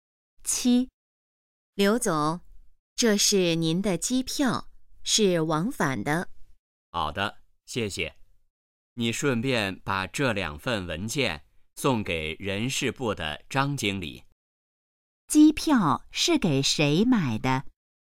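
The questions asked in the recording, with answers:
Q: 机票是给谁买的?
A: 刘总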